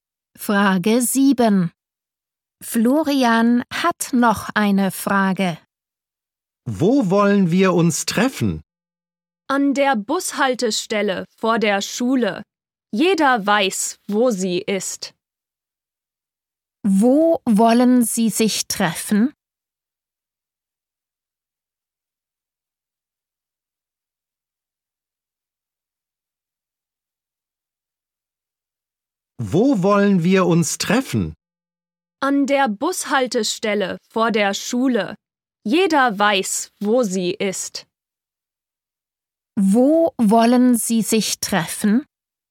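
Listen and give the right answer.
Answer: An der Bushaltestelle vor der Schule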